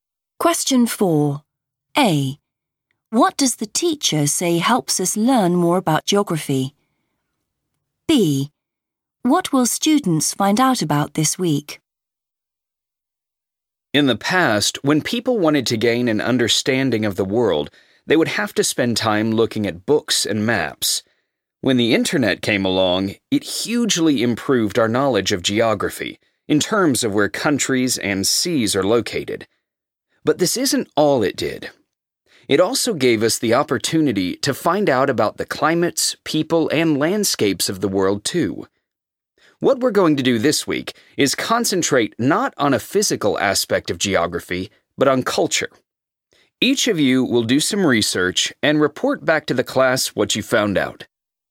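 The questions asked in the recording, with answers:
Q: What does the teacher say helps us learn more about geography?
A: the internet

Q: What will students find out about this week?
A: culture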